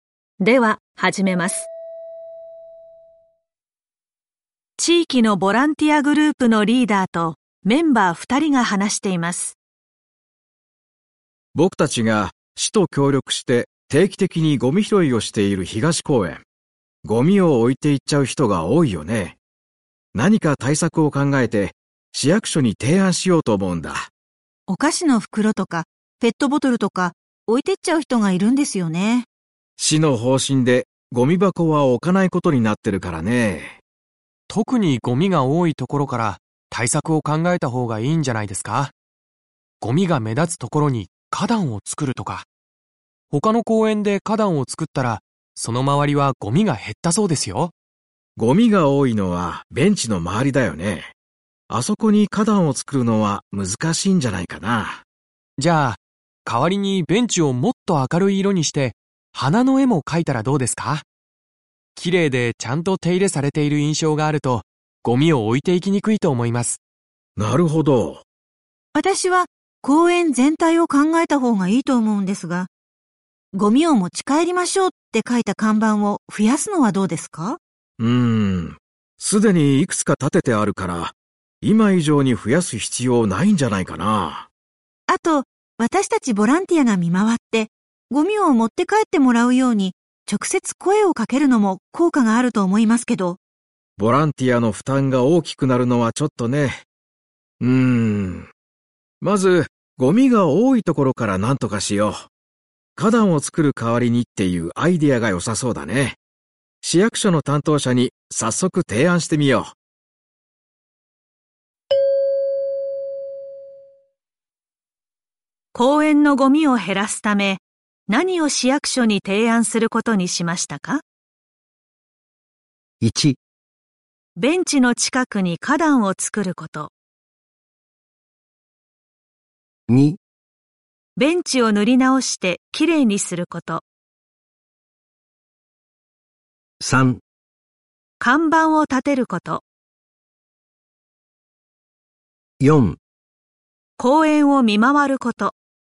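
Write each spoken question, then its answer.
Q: 公園のゴミを減らすため、何を市役所に提案することにしましたか?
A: 2: ベンチを塗り直してきれいにすること。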